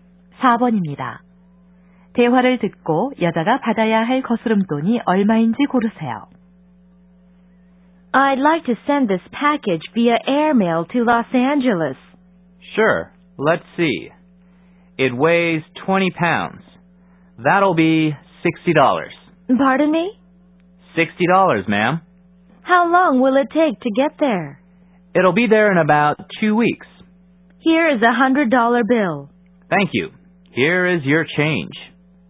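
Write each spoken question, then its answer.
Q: 대화를 듣고 여자가 받아야 할 거스름돈이 얼마인지 고르세요.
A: 40달러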